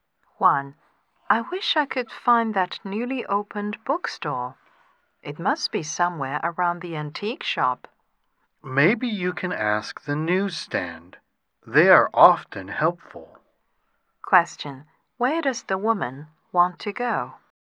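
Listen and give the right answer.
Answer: The newly opened bookstore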